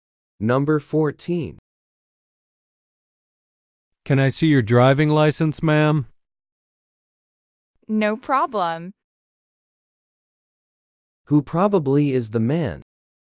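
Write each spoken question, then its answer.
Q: Who probably is the man?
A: A police officer.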